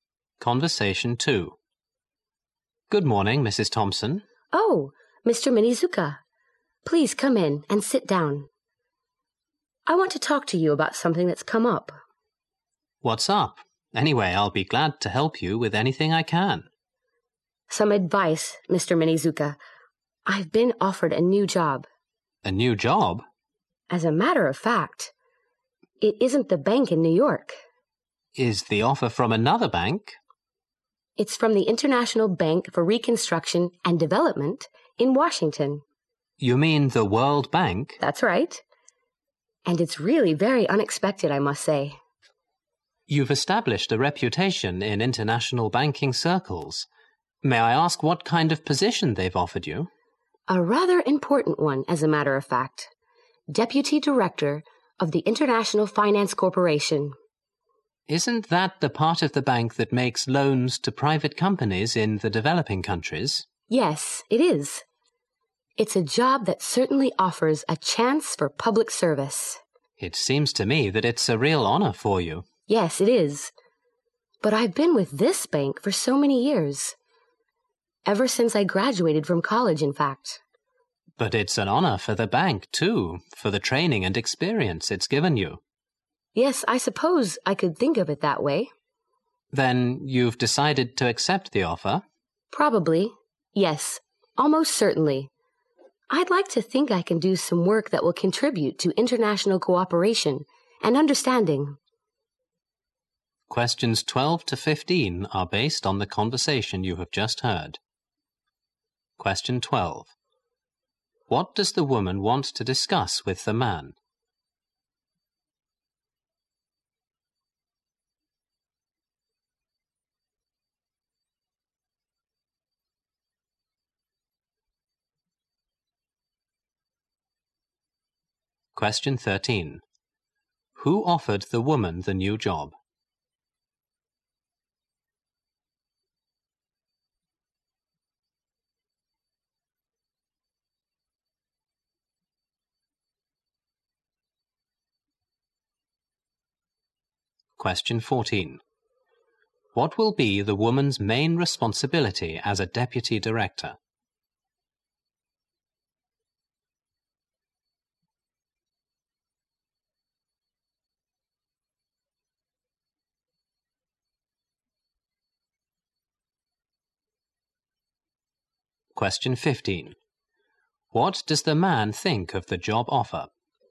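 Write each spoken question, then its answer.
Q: What does the woman want to discuss with the man?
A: A new job offer she has received.

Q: Who offered the woman the new job?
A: The World Bank.

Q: What will be the woman's main responsibility as a deputy director?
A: Making loans to private companies in developing countries.

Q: What does the man think of the job offer?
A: It is a real honor for her.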